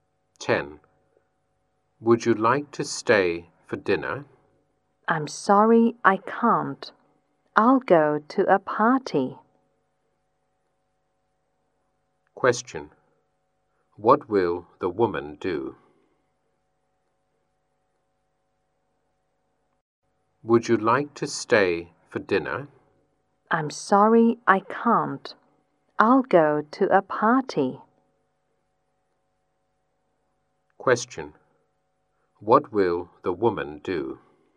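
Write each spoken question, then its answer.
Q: What will the woman do?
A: Go to a party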